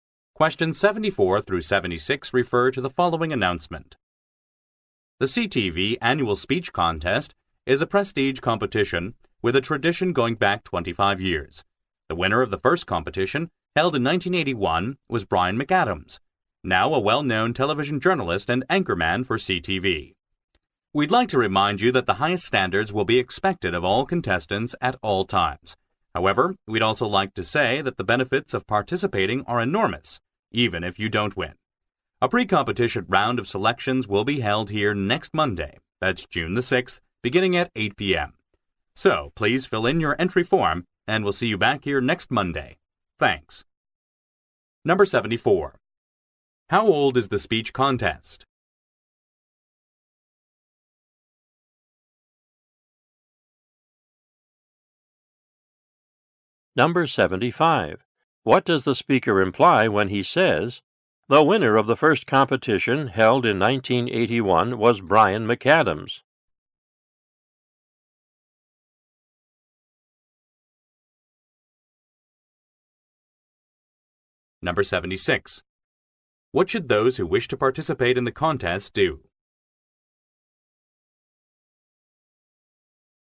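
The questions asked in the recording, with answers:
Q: How old is the speech contest?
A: 25 years

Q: What should those who wish to participate in the contest do?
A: Fill in an entry form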